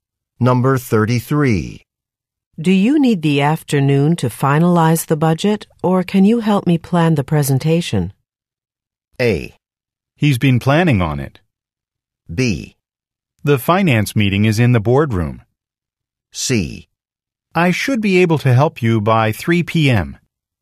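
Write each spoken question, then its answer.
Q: Do you need the afternoon to finalize the budget, or can you help me plan the presentation?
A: C: I should be able to help you by 3 p.m.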